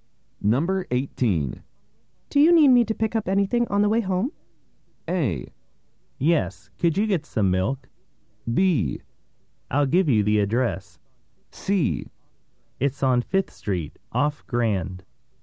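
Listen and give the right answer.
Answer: A: Yes, could you get some milk?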